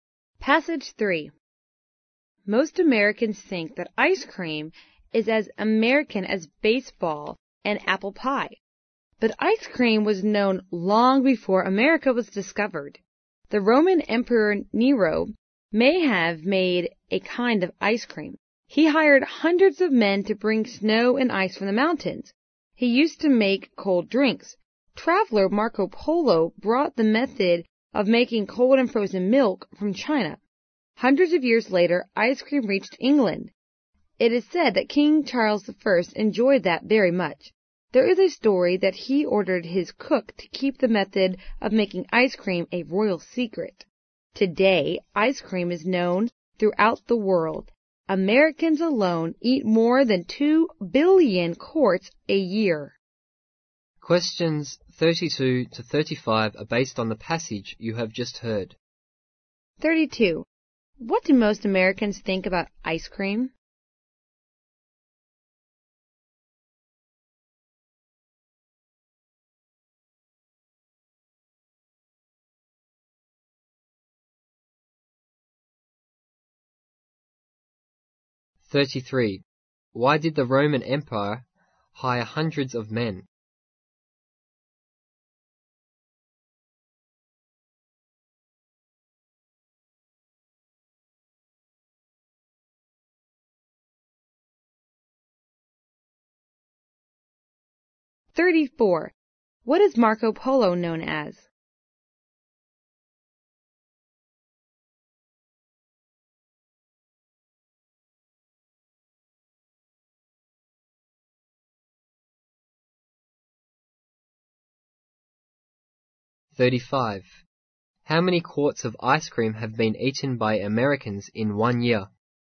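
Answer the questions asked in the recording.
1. That it is as American as baseball and apple pie
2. To bring snow and ice from the mountains
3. A traveler
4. More than 2 billion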